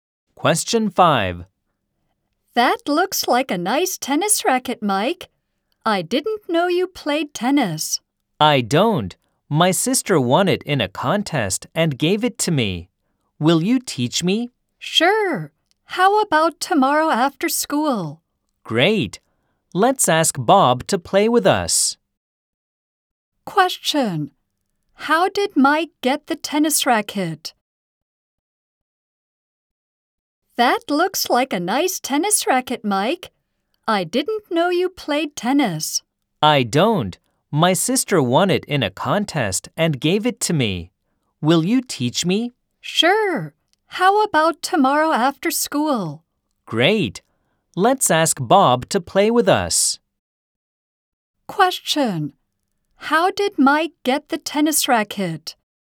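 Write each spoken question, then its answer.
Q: How did Mike get the tennis racket?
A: His sister won it in a contest and gave it to him.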